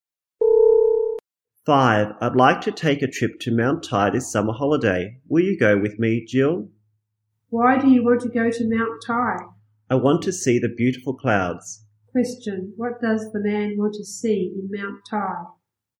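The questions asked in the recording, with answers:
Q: what does the man want to see in Mount Tai?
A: The beautiful clouds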